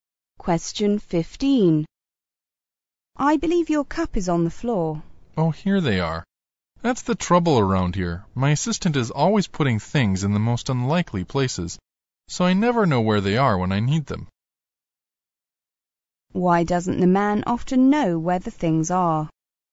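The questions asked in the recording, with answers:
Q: Why doesn't the man often know where the things are?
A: His assistant always puts things in unlikely places.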